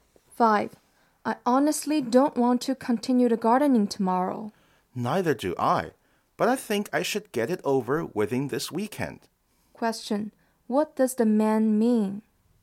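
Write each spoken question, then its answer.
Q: What does the man mean?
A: He doesn't want to, but he'll finish the gardening this weekend.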